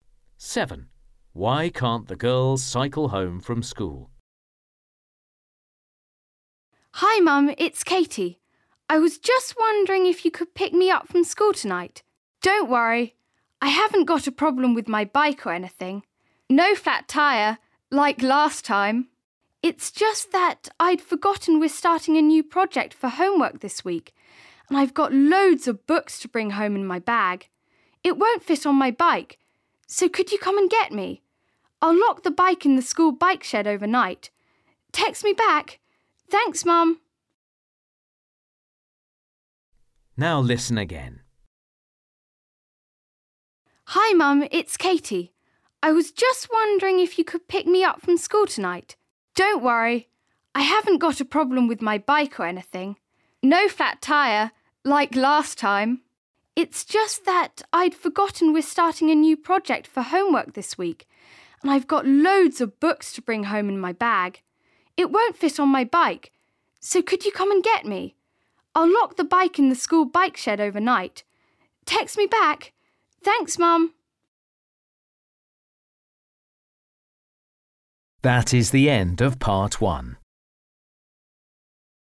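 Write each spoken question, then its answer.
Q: Why can't the girls cycle home from school?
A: Her bag of books won't fit on her bike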